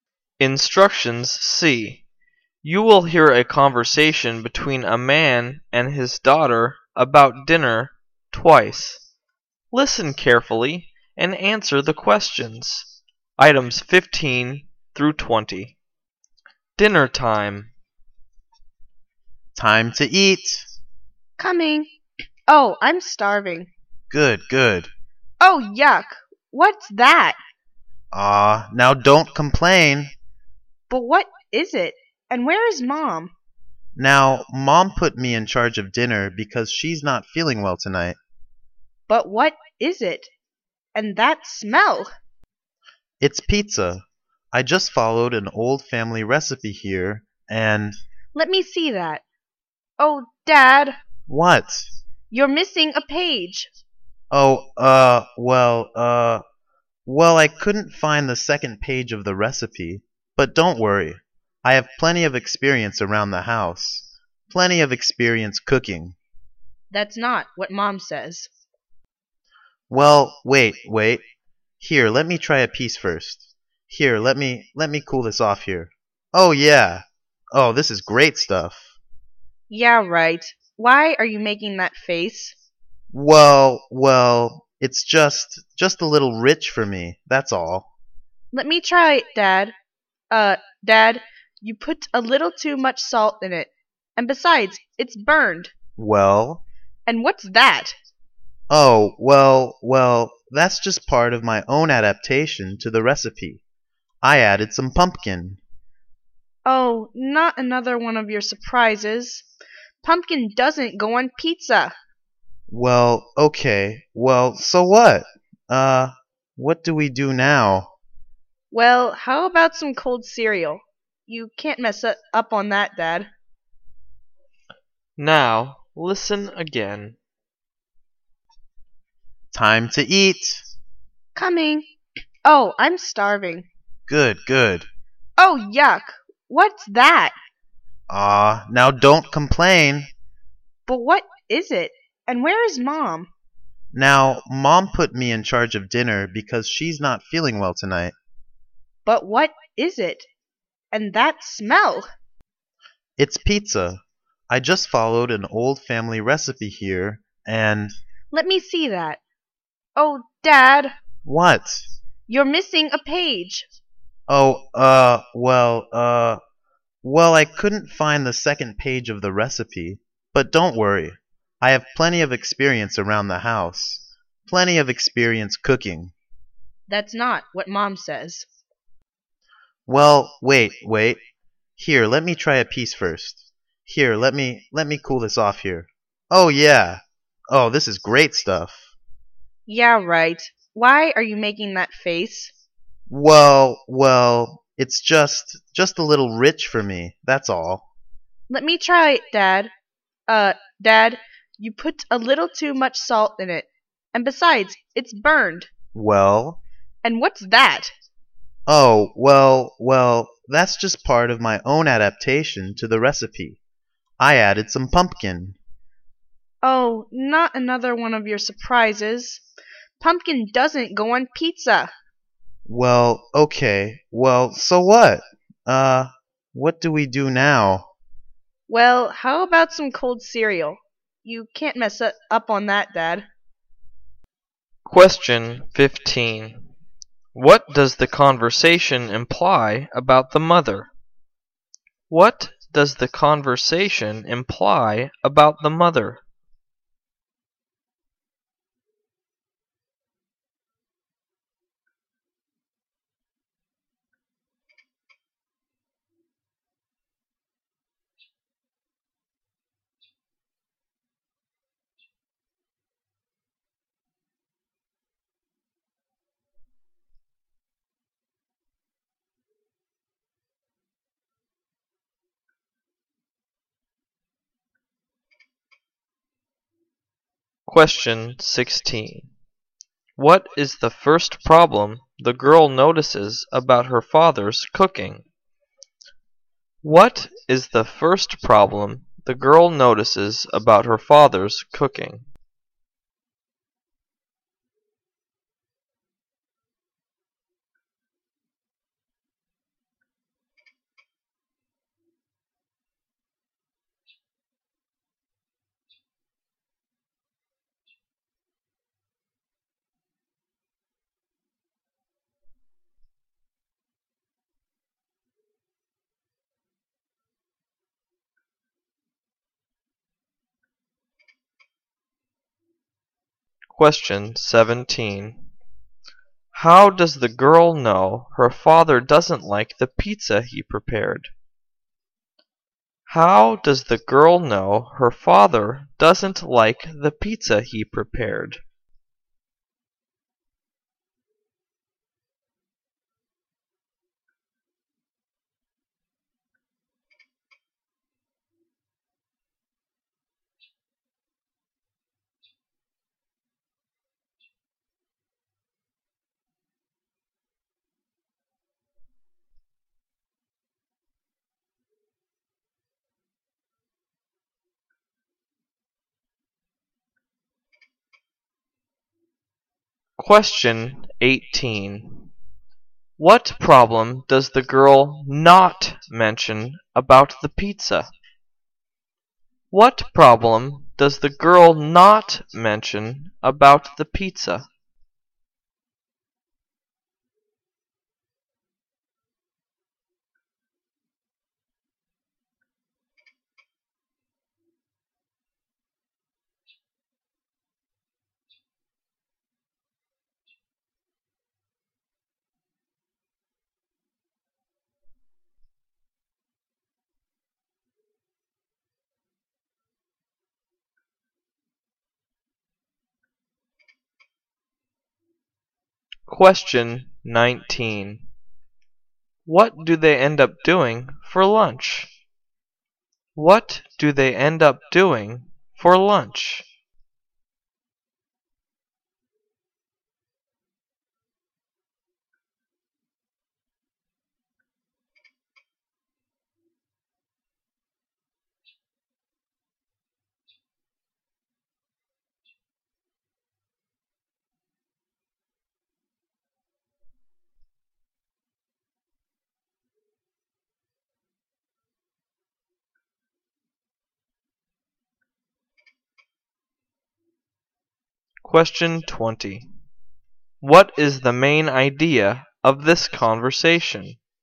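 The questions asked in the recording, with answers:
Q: What does the conversation imply about the mother?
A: She is not feeling well

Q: How does the girl know her father doesn't like the pizza he prepared?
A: He makes a face

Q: What do they end up doing for lunch?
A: Eating cold cereal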